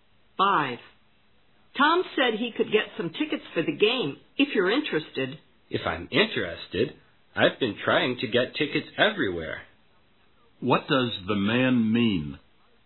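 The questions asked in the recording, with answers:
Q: What does the man mean?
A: He is very interested in getting tickets.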